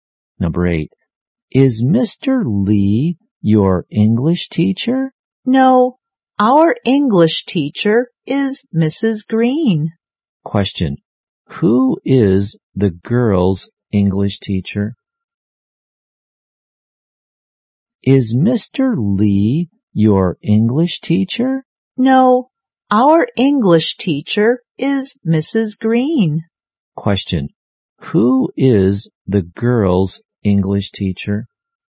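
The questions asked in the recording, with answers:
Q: Question. Who is the girls' English teacher?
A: Mrs. Green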